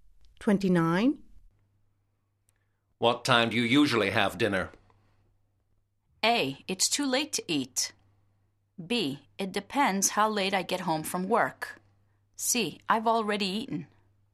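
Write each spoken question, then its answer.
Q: What time do you usually have dinner?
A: B: It depends how late I get home from work.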